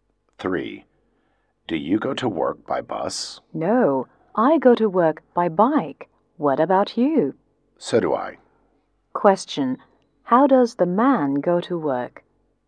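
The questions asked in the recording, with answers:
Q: How does the man go to work?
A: By bike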